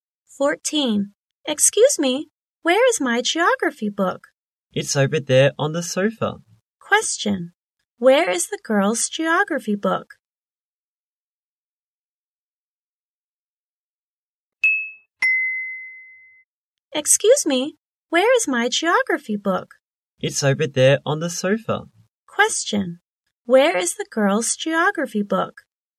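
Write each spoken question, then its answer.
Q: Question. Where is the girl's geography book?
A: On the sofa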